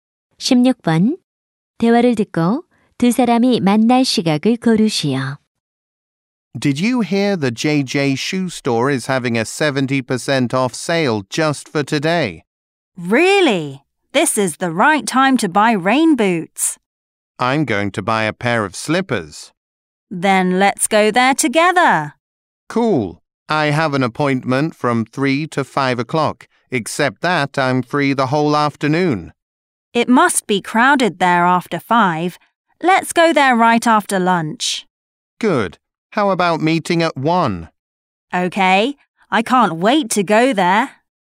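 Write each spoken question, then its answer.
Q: 대화를 듣고 두 사람이 만날 시각을 고르시오.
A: 1시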